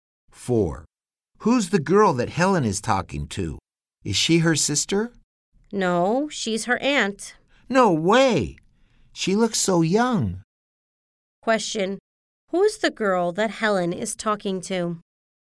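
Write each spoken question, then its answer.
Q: Who's the girl that Helen is talking to?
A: Helen's aunt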